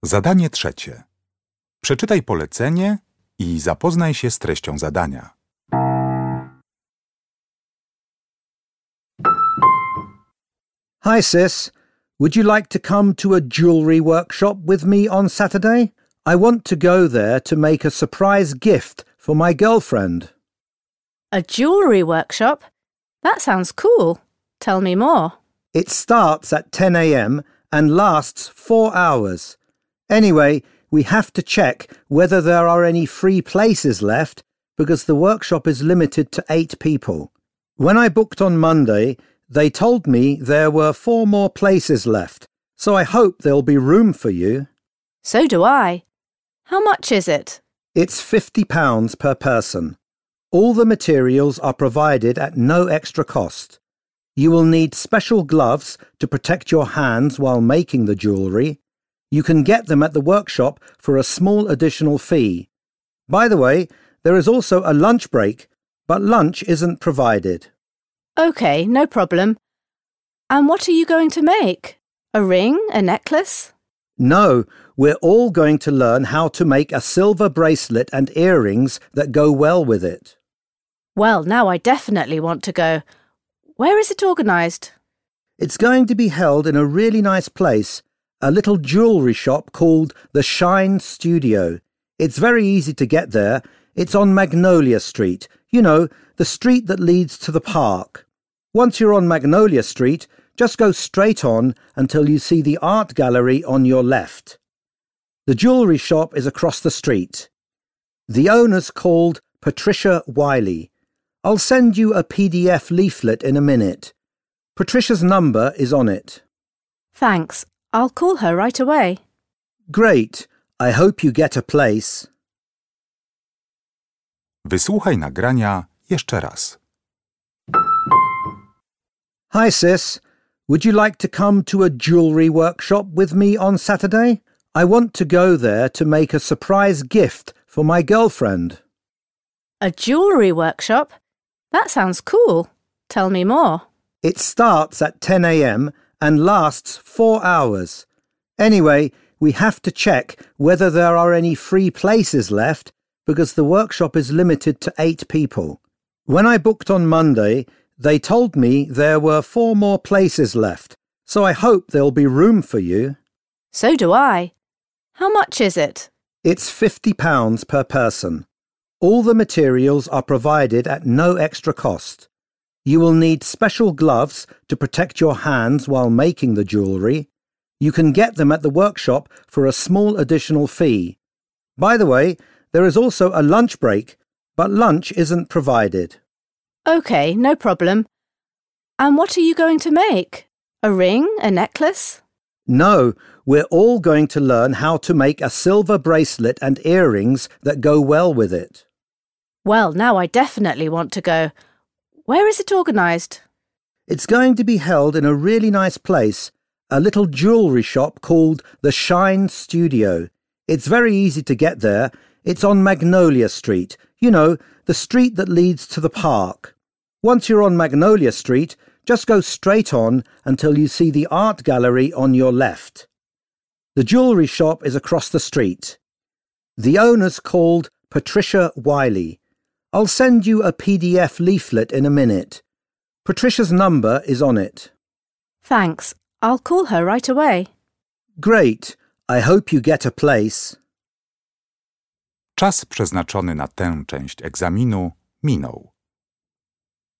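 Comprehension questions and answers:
Na podstawie informacji zawartych w nagraniu uzupełnij luki 3.1.–3.4. w ulotce reklamowej, tak aby jak najbardziej precyzyjnie oddać sens wysłuchanego tekstu. Luki należy uzupełnić w języku angielskim.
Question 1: Number of participants – up to 3.1. .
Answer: 8

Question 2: used for protection NOT INCLUDED.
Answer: gloves

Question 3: Don't miss this chance to create a silver bracelet and matching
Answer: earrings

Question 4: Location: The Shine Studio on Magnolia Street – opposite the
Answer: art gallery

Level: Poziom: podstawowy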